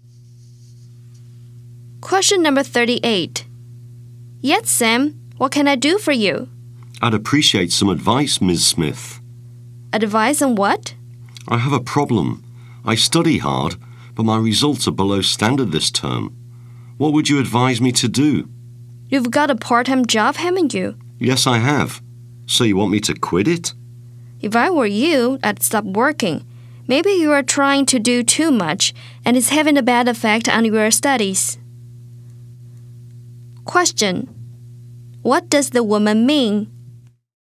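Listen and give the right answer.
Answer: Sam should quit his part-time job to focus on his studies.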